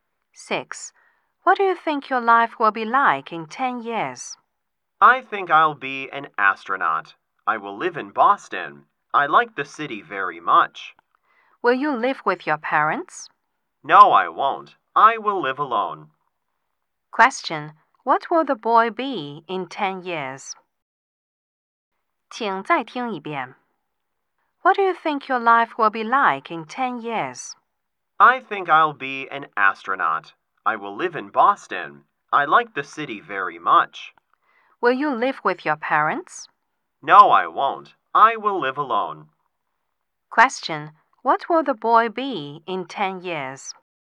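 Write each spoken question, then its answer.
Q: What will the boy be in 10 years?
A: An astronaut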